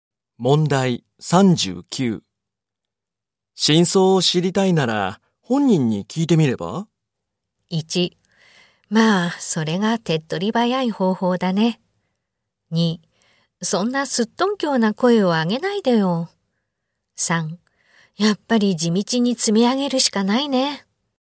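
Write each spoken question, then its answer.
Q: 真相を知りたいなら本人に聞いてみれば?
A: 1: まあそれが手っ取り早い方法だね。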